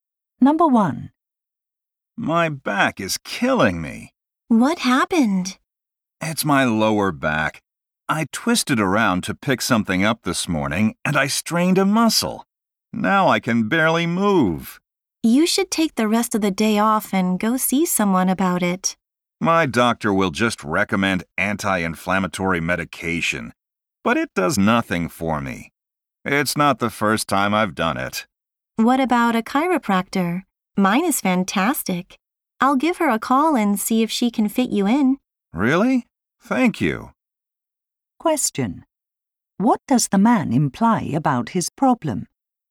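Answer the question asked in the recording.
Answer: It has happened before, and the medicine his doctor gives him doesn't help.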